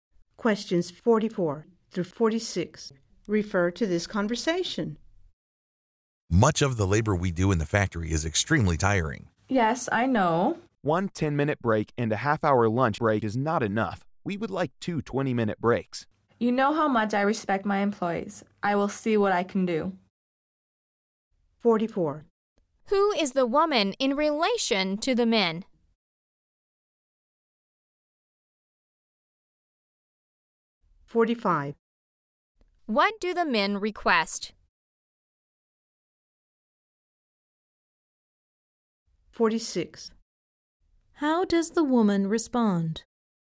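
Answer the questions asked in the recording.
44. Their employer
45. Two 20-minute breaks
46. She will see what she can do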